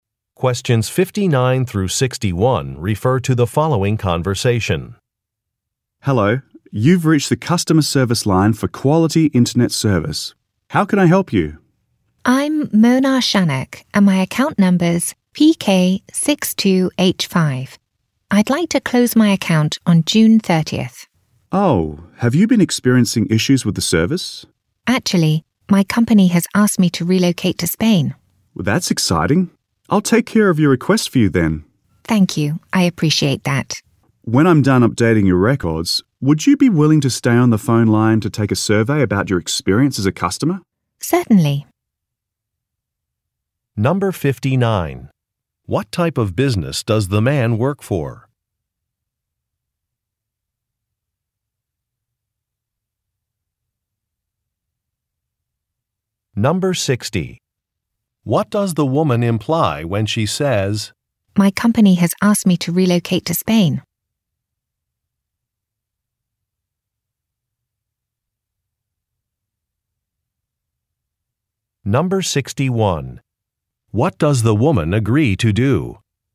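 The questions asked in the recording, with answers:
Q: What type of business does the man work for?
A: An internet service provider

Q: What does the woman imply when she says, "My company has asked me to relocate to Spain"?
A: She is closing the account because she is moving, not because of service problems

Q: What does the woman agree to do?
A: Take a customer survey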